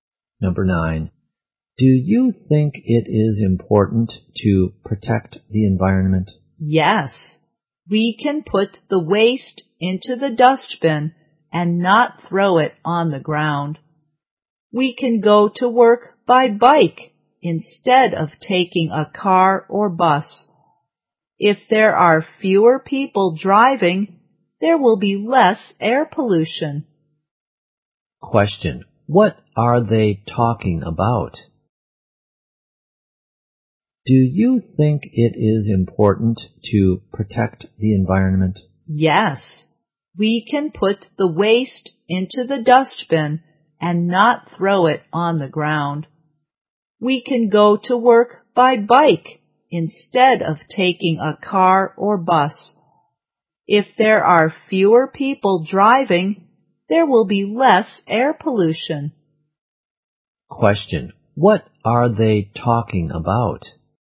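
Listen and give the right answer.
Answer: How to protect the environment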